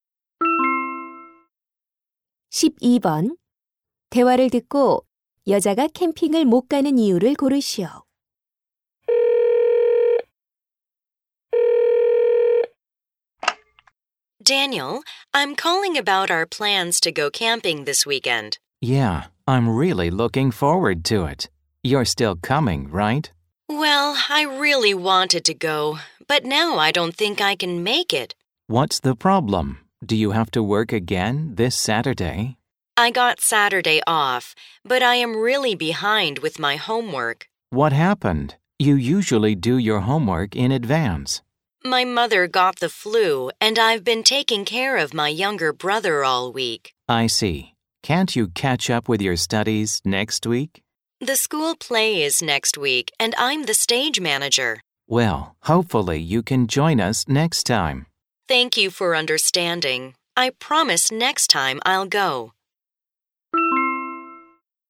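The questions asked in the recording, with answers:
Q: 대화를 듣고 여자가 캠핑을 못 가는 이유를 고르시오.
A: 밀린 숙제를 해야 해서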